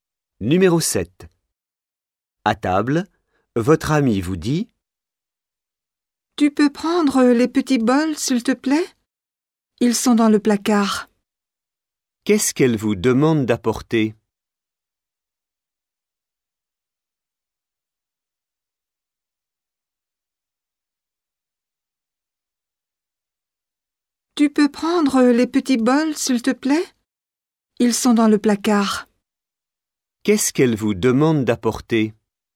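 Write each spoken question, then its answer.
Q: Qu'est-ce qu'elle vous demande d'apporter?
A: Les petits bols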